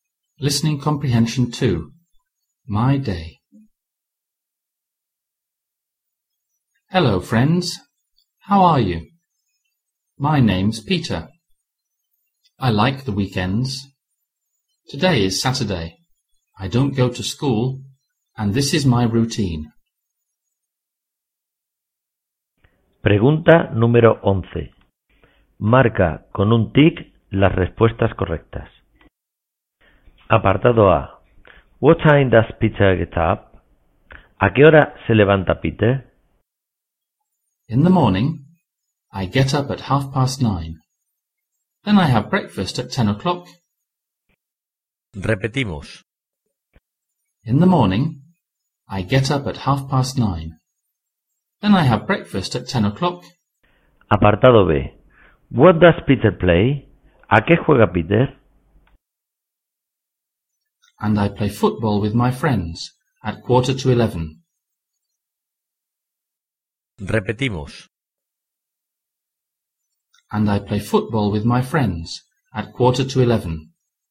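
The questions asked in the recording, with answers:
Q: What time does Peter get up?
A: At 9:30

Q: What does Peter play?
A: Football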